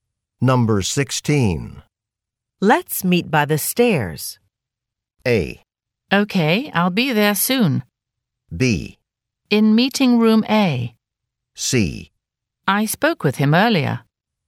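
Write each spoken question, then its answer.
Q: Let's meet by the stairs.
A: A: Okay, I'll be there soon.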